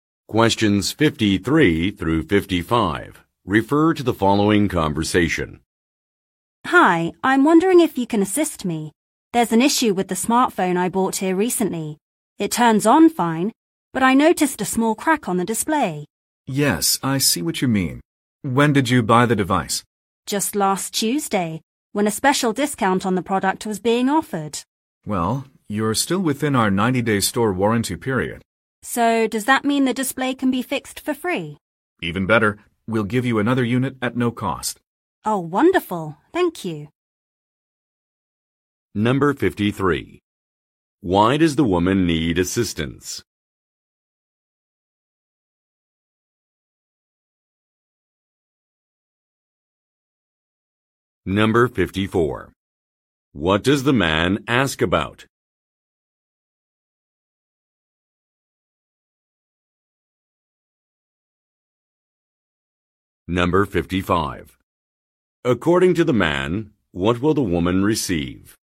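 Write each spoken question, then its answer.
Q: Why does the woman need assistance?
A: Her new smartphone has a small crack on the display.

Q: What does the man ask about?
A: When she bought the device.

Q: According to the man, what will the woman receive?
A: A replacement unit at no cost.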